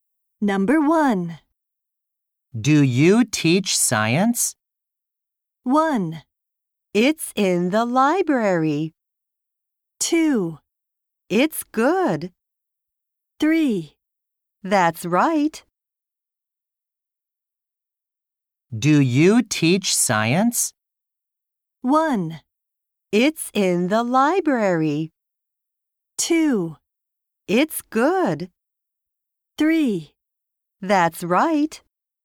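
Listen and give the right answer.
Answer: 3: That's right.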